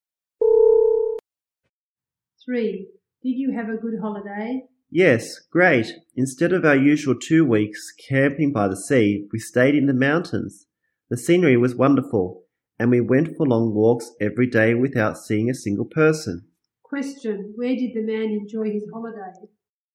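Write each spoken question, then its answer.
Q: where did the man enjoy his holiday?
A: In the mountains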